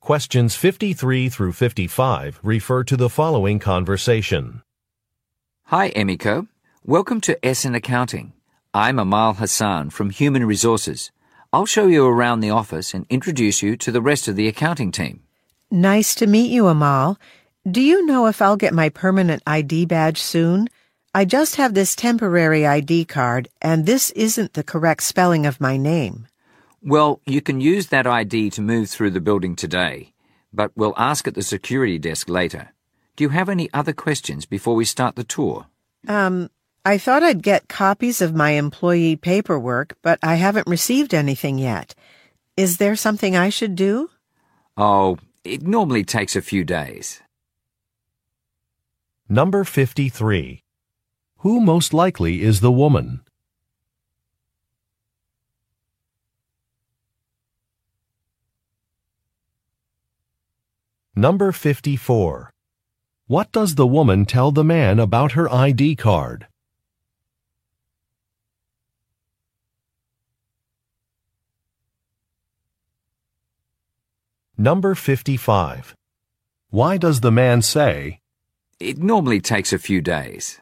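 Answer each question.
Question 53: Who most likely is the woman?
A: An accountant

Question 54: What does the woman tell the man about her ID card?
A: Her name is misspelled.

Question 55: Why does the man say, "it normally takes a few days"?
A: To address a concern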